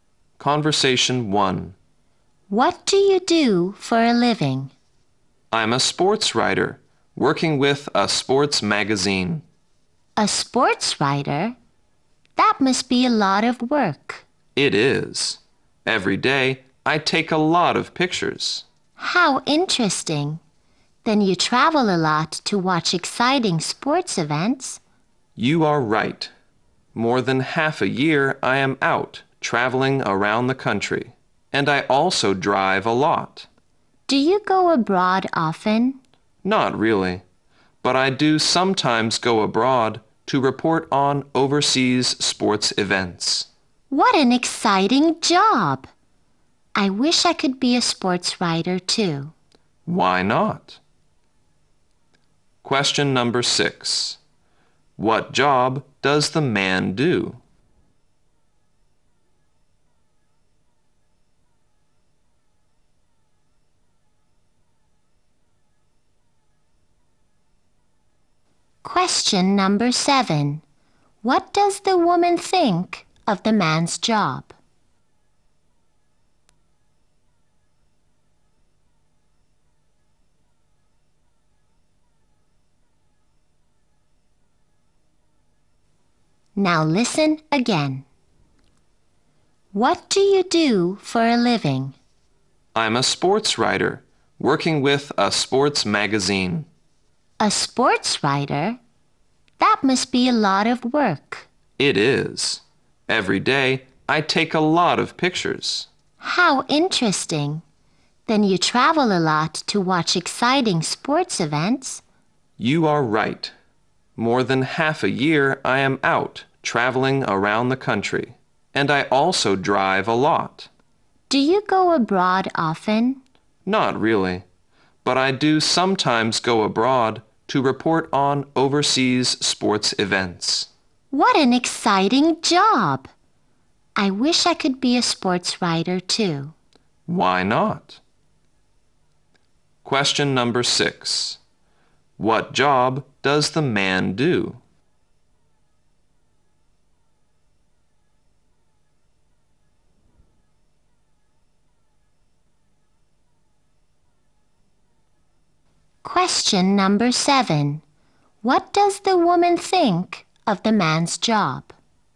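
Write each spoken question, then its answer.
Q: What job does the man do?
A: Sports writer

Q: What does the woman think of the man's job?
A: Exciting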